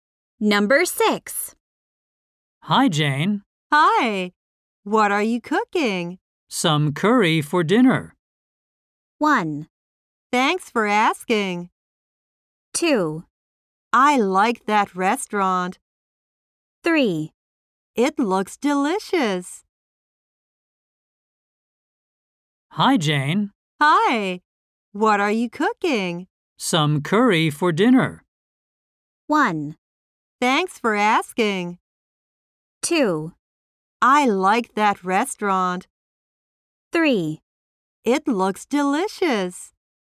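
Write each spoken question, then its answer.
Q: Some curry for dinner.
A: 3: It looks delicious.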